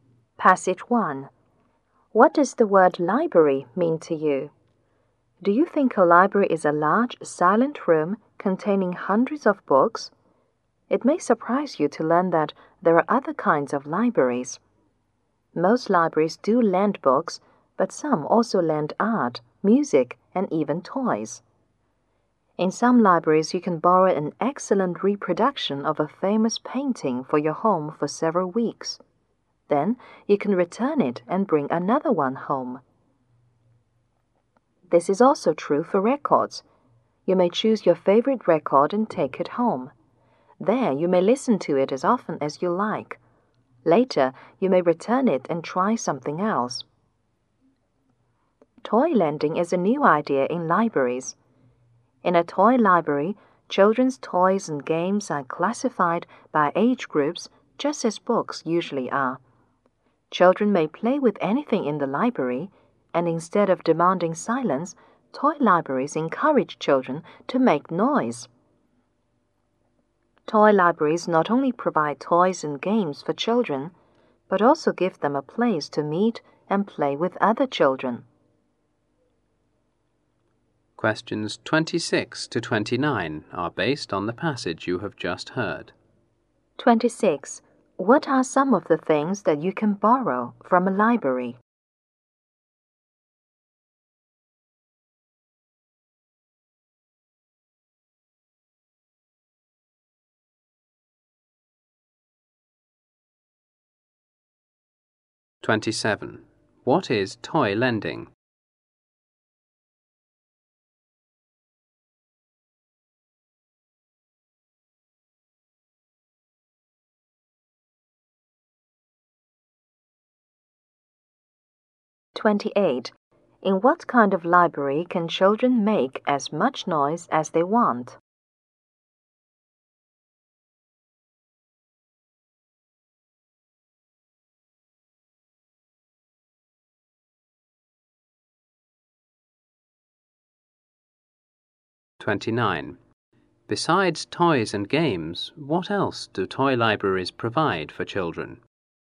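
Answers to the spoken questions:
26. Art, music (records) and toys
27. A new idea in libraries: lending toys and games to children
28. A toy library
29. A place to meet and play with other children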